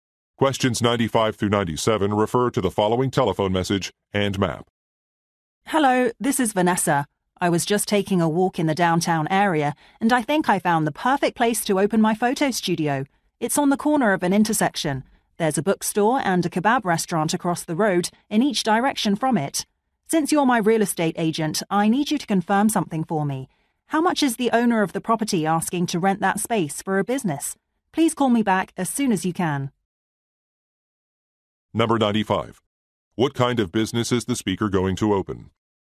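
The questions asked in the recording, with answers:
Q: What kind of business is the speaker going to open?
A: A photo studio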